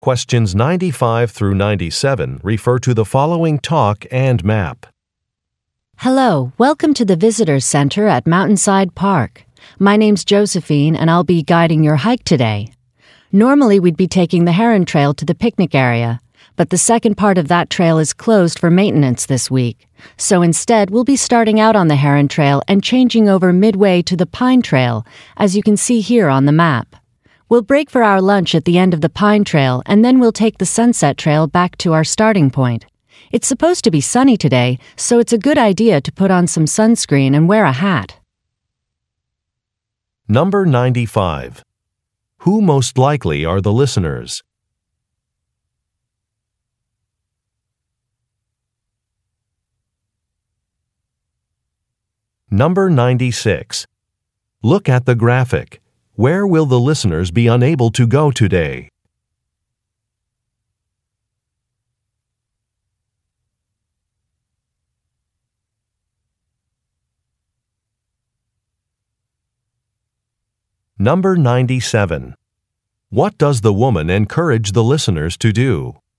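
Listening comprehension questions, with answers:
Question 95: Who most likely are the listeners?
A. Maintenance workers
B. Bus drivers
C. Tourists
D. Park rangers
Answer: Tourists

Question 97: What does the woman encourage the listeners to do?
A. Bring a map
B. Check the weather forecast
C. Store their belongings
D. Use sun protection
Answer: Use sun protection

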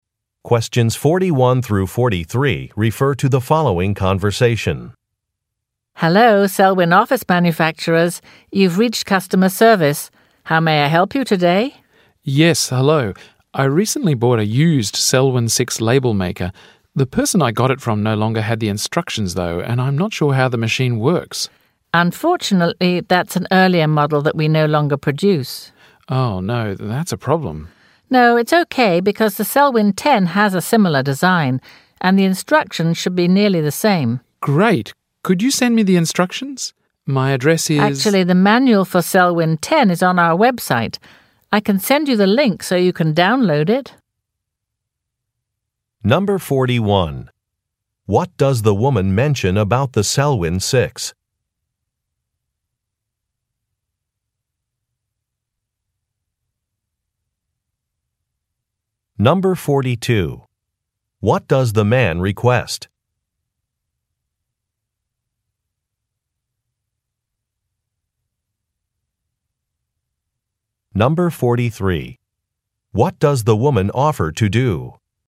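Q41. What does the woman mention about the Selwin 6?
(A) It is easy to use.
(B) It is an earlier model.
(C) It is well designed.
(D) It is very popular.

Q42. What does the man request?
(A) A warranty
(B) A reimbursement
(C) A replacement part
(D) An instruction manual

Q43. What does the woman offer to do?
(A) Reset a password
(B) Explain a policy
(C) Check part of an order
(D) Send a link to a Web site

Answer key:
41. It is an earlier model.
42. An instruction manual
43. Send a link to a Web site

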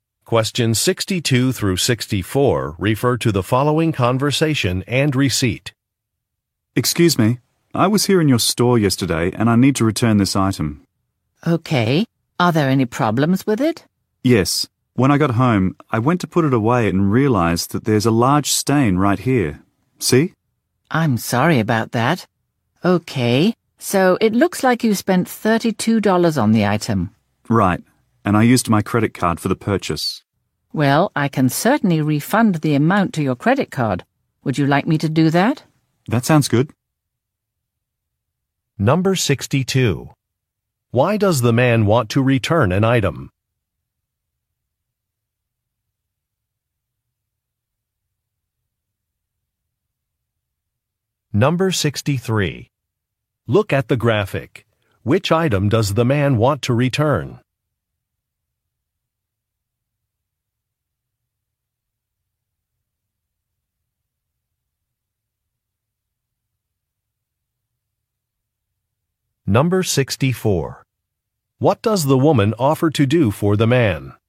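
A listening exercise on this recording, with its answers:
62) Why does the man want to return an item?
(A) It has a stain.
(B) It has a tear.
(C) It is the wrong color.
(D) It is too large.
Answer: It has a stain.

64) What does the woman offer to do for the man?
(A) Issue a refund to his credit card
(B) Set up an account for him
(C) Consult with a manager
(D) Call another branch store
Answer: Issue a refund to his credit card

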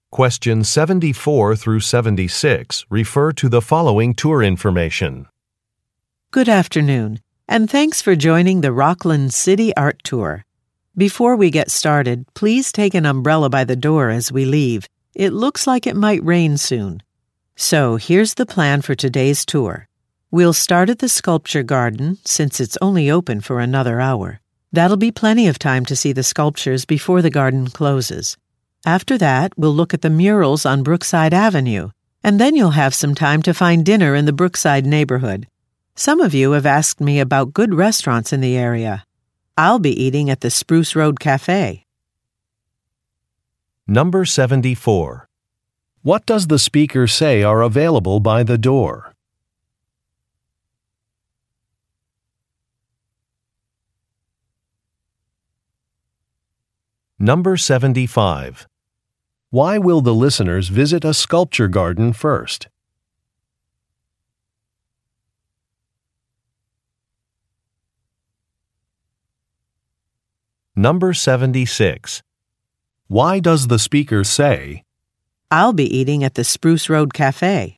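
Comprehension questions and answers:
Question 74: What does the speaker say are available by the door?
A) Flowers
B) Coupons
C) Umbrellas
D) Guidebooks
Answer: Umbrellas

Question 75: Why will the listeners visit a sculpture garden first?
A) It is nearby.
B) It closes soon.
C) It is hosting an activity.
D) It is a popular attraction.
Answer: It closes soon.

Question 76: Why does the speaker say, "I'll be eating at the Spruce Road Café"?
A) To make a recommendation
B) To volunteer for a task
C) To ask for directions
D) To explain a delay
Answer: To make a recommendation

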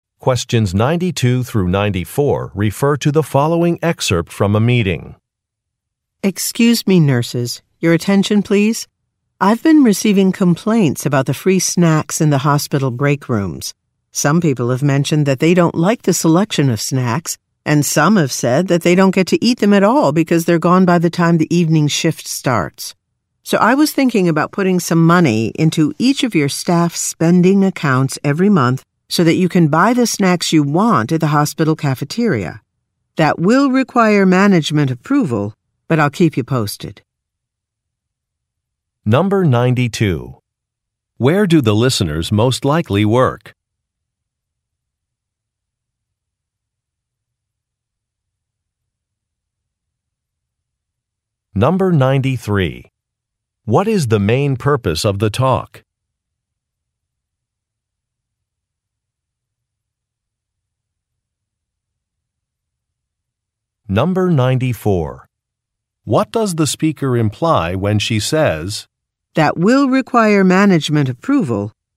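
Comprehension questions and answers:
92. Where do the listeners most likely work?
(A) At a hospital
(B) At a restaurant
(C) At a grocery store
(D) At an electronics store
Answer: At a hospital

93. What is the main purpose of the talk?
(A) To make a request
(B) To address staff complaints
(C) To present a new schedule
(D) To explain a technical process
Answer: To address staff complaints

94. What does the speaker imply when she says, "That will require management approval"?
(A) A process has not been followed.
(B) The listeners may be asked to work extra shifts.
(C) The listeners should contact a manager.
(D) A change will not be immediate.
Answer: A change will not be immediate.

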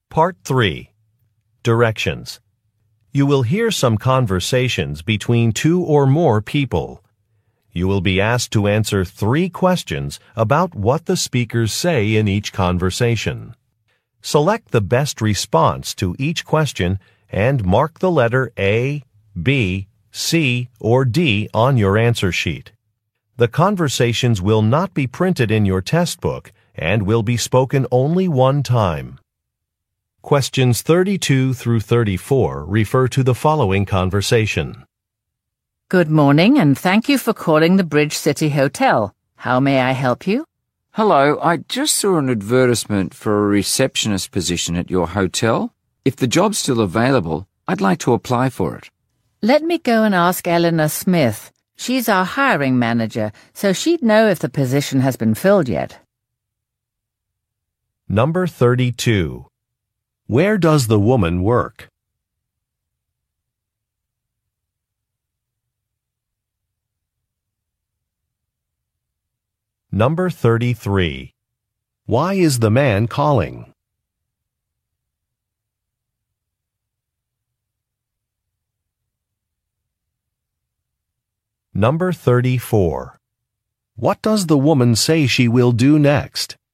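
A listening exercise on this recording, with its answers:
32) Where does the woman work?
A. At an electronics store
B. At a newspaper publisher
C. At a bank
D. At a hotel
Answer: At a hotel

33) Why is the man calling?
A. To update a mailing address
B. To complain about a billing error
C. To inquire about a job opening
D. To request a price estimate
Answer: To inquire about a job opening

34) What does the woman say she will do next?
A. Schedule an appointment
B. Talk to a coworker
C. Process a refund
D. Send some samples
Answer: Talk to a coworker

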